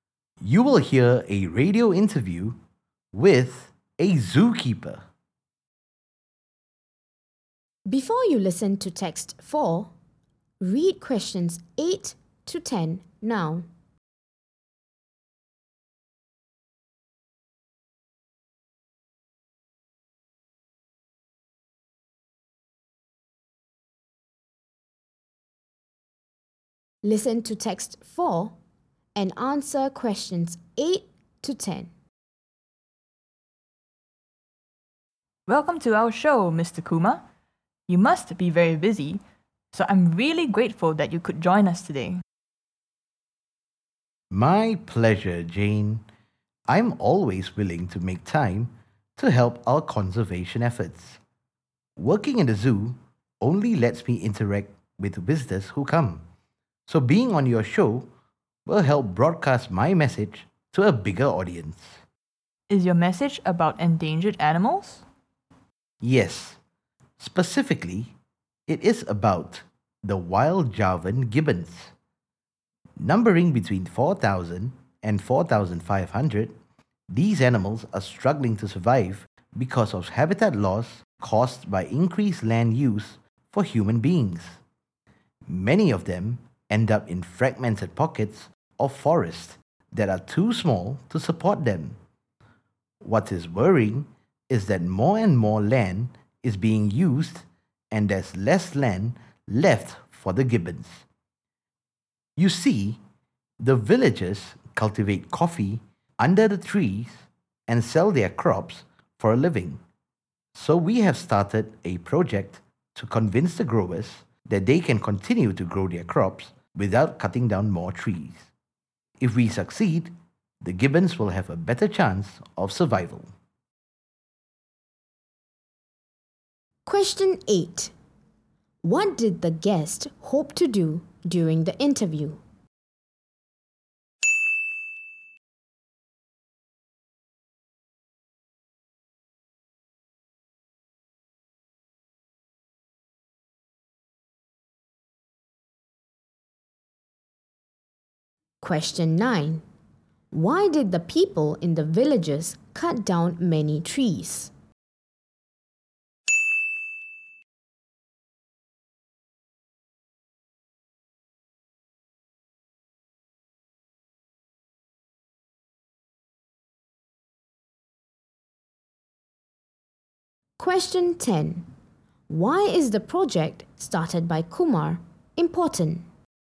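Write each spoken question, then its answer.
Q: What did the guest hope to do during the interview?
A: Spread his conservation message to a bigger audience

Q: Why did the people in the villages cut down many trees?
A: To use the land to grow coffee to sell for a living

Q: Why is the project started by Kumar important?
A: It could give the gibbons a better chance of survival by stopping more trees being cut down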